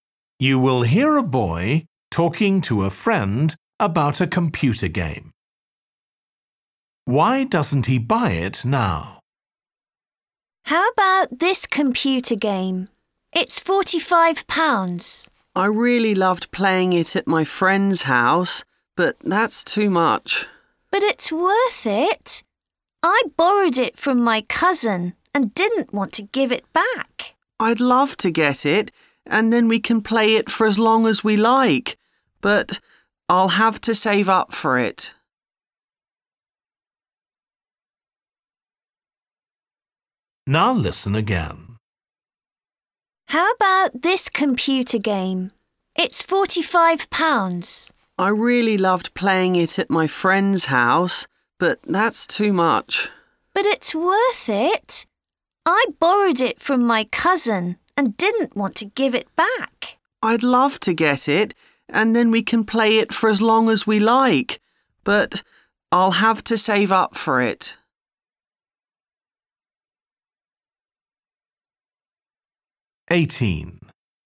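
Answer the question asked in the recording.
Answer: It's too expensive; he has to save up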